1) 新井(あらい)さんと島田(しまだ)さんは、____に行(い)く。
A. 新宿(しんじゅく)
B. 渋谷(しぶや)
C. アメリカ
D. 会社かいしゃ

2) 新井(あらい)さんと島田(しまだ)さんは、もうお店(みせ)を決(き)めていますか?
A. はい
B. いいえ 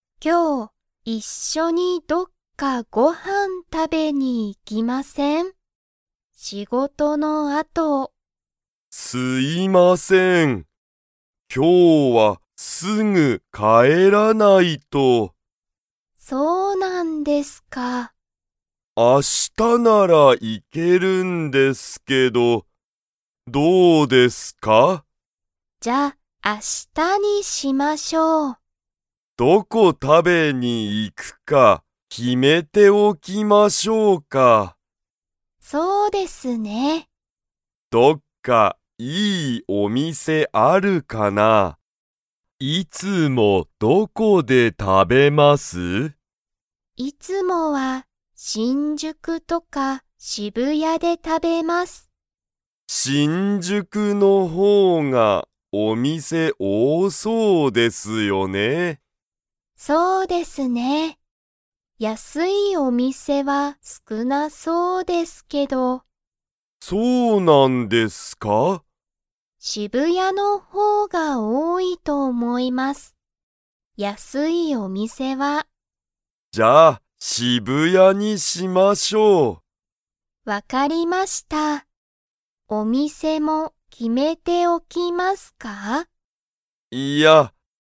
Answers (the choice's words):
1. 渋谷(しぶや)
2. いいえ

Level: Level 2